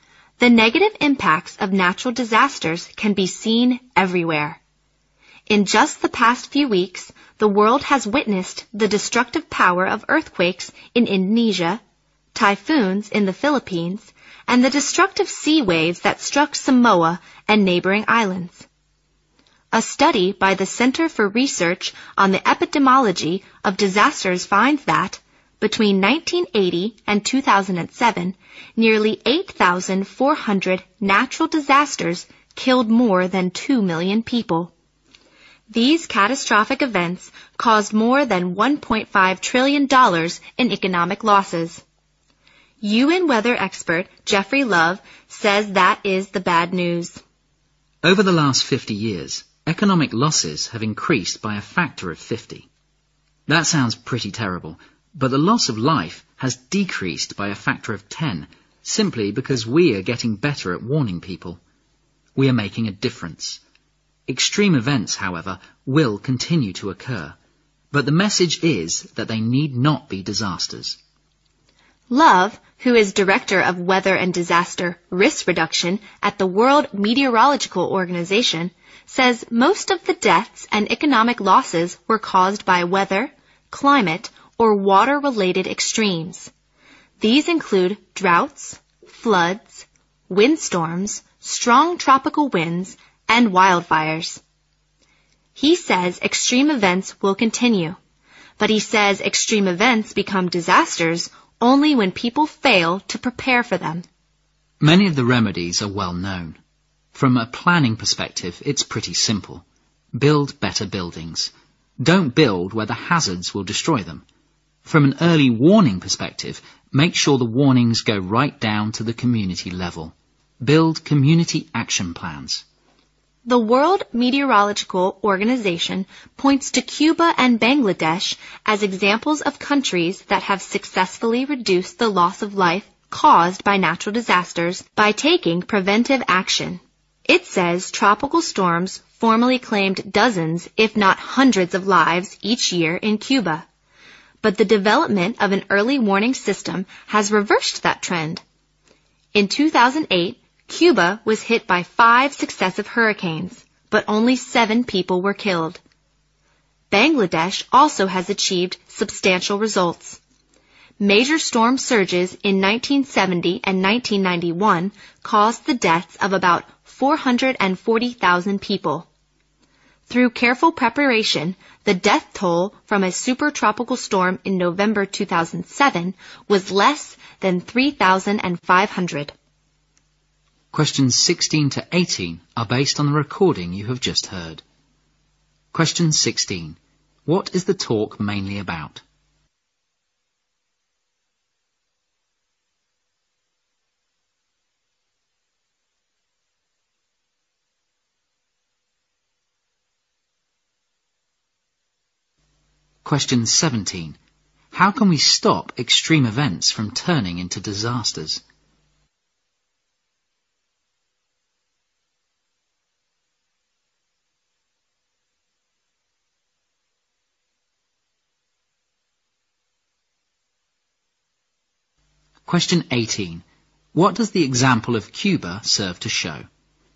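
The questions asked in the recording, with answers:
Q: What is the talk mainly about?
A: Reducing the losses from natural disasters through preparation

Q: How can we stop extreme events from turning into disasters?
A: By preparing for them, e.g. better buildings, early warnings, community action plans

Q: What does the example of Cuba serve to show?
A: Early warning systems can greatly reduce deaths from natural disasters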